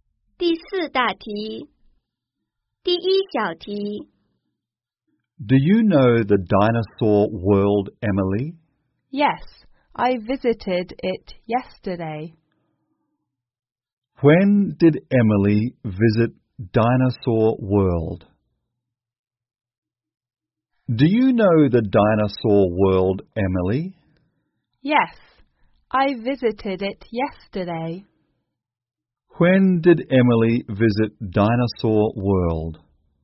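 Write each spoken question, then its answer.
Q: When did Emily visit Dinosaur World?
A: Yesterday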